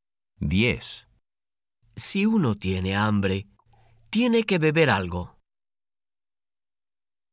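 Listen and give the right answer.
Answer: No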